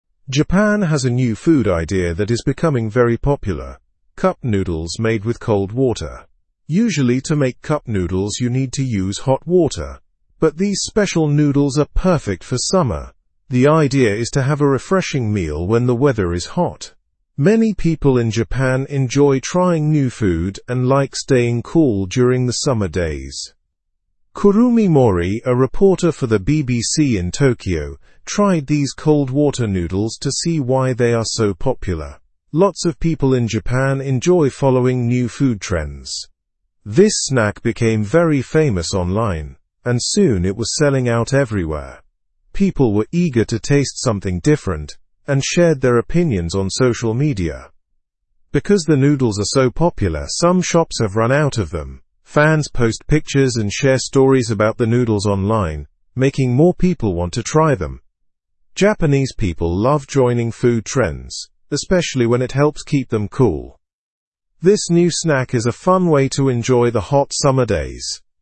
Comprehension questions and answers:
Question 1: What is the new food idea in Japan?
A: Cup noodles made with cold water.

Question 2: How do these new noodles differ from usual cup noodles?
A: They do not require hot water and are made for summer.

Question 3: Who reported on trying the cold water noodles?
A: Kurumi Mori, a BBC reporter in Tokyo.

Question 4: Why did this snack become so famous?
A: It went viral online and became very popular.

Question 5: What did some shops experience because of the noodles' popularity?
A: Some shops ran out of these noodles.

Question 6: How did fans help increase the popularity of the noodles?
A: They shared pictures and experiences online.

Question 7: Why might Japanese people enjoy these noodles during hot summer weather?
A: Because they are refreshing and help people stay cool.

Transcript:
Japan has a new food idea that is becoming very popular: cup noodles made with cold water. Usually, to make cup noodles, you need to use hot water, but these special noodles are perfect for summer. The idea is to have a refreshing meal when the weather is hot. Many people in Japan enjoy trying new food and like staying cool during the summer days.
Kurumi Mori, a reporter for the BBC in Tokyo, tried these cold water noodles to see why they are so popular. Lots of people in Japan enjoy following new food trends. This snack became very famous online, and soon it was selling out everywhere. People were eager to taste something different and shared their opinions on social media.
Because the noodles are so popular, some shops have run out of them. Fans post pictures and share stories about the noodles online, making more people want to try them. Japanese people love joining food trends, especially when it helps keep them cool. This new snack is a fun way to enjoy the hot summer days.

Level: (Level 2)